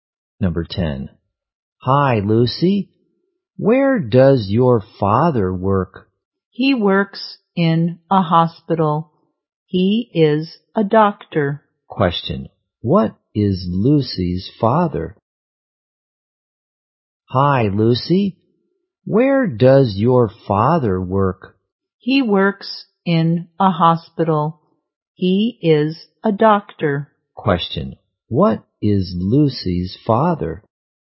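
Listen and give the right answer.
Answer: A doctor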